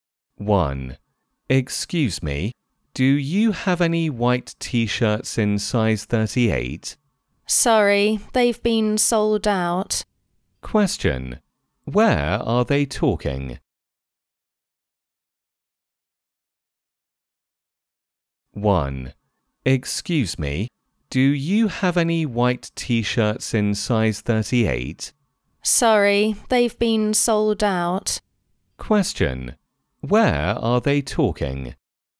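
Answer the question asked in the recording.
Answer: In a clothes shop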